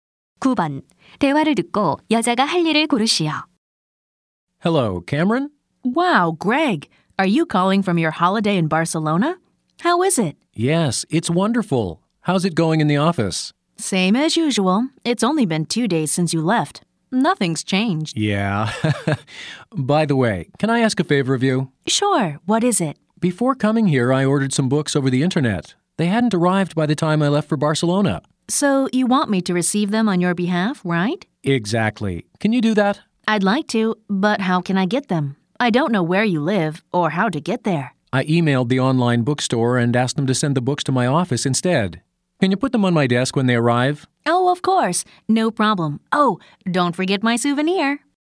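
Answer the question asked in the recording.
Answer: 책이 도착하면 남자의 책상 위에 놓아 두기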